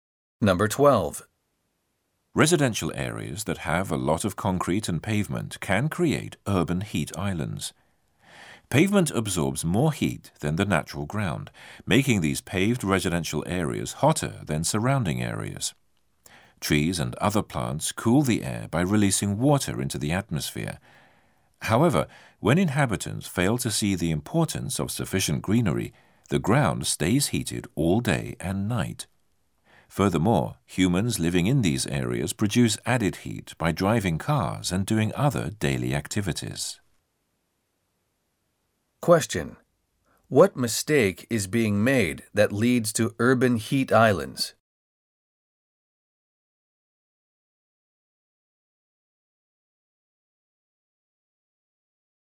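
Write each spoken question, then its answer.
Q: What mistake is being made that leads to urban heat islands?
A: Inhabitants fail to plant enough greenery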